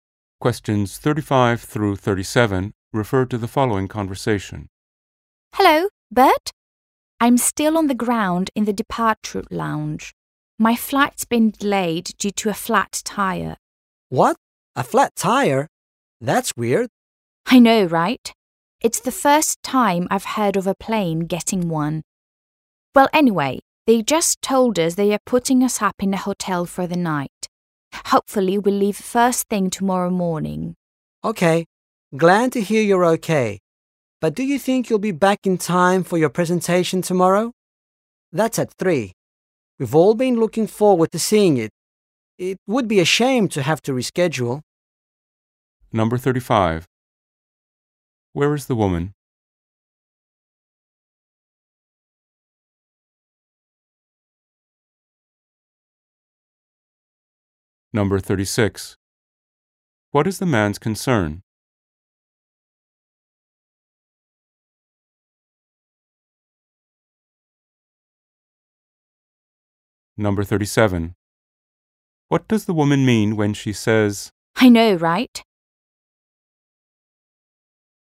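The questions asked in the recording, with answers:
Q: Where is the woman?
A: In an airport departure lounge

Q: What is the man's concern?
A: Whether she will be back in time for her presentation tomorrow

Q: What does the woman mean when she says,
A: She agrees that a plane getting a flat tire is strange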